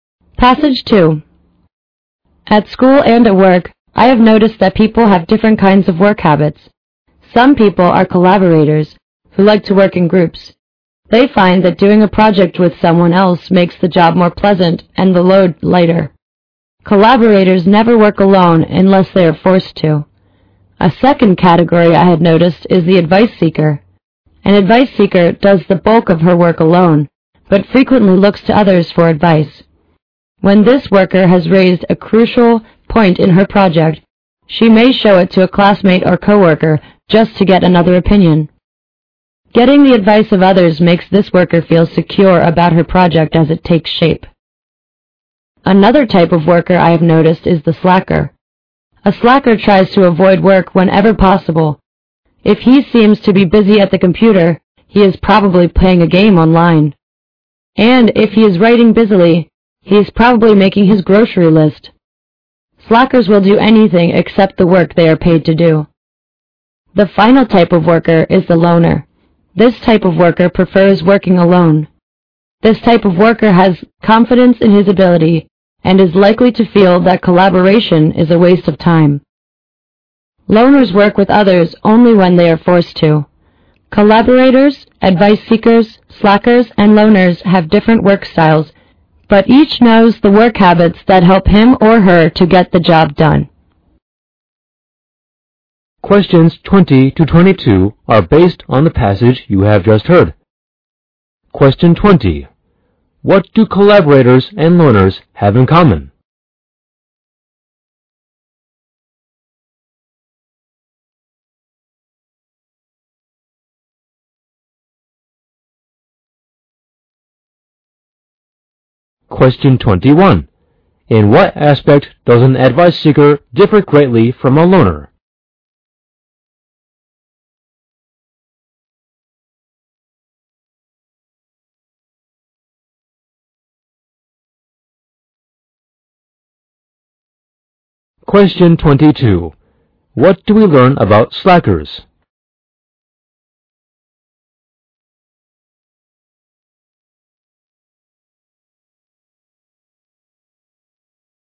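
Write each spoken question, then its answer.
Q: What do we learn about slackers?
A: They try to avoid work whenever possible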